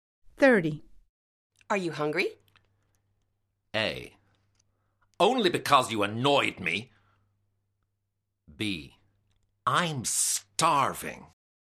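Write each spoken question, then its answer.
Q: Are you hungry?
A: B: I'm starving.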